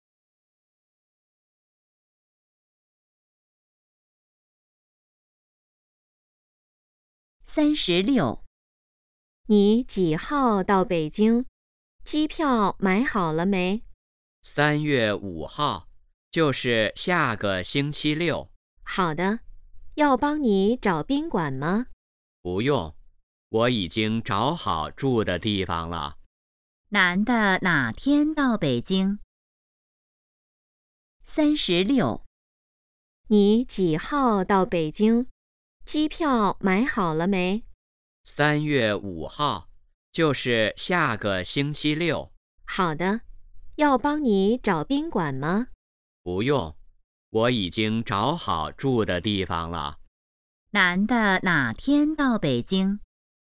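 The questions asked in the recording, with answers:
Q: 男的哪天到北京?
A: 3月5号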